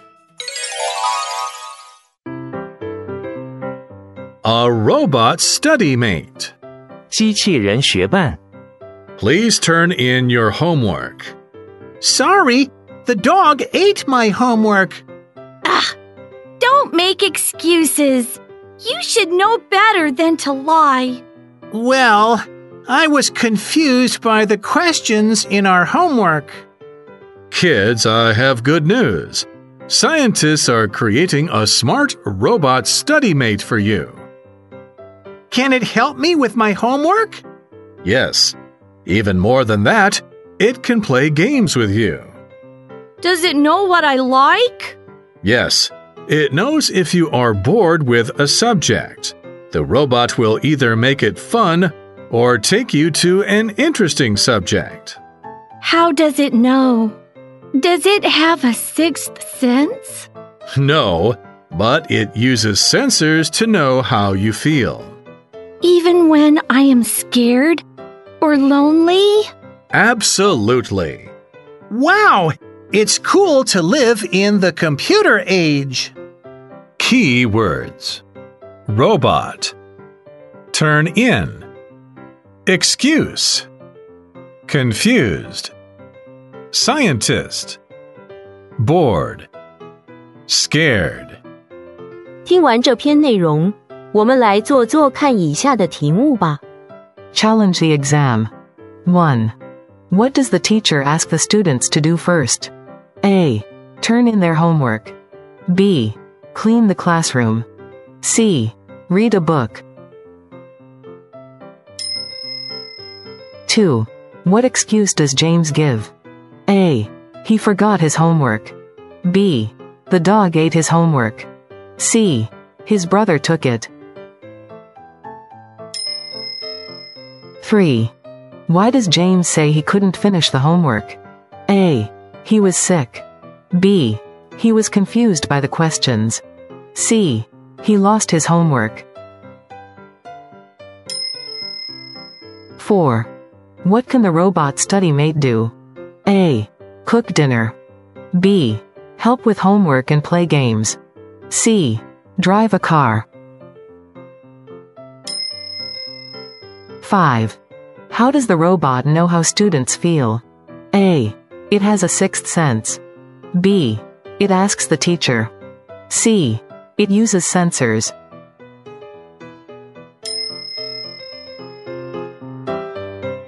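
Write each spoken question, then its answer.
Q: What does the teacher ask the students to do first?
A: A: Turn in their homework.

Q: What excuse does James give?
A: B: The dog ate his homework.

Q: Why does James say he couldn't finish the homework?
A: B: He was confused by the questions.

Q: What can the robot study mate do?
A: B: Help with homework and play games.

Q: How does the robot know how students feel?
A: C: It uses sensors.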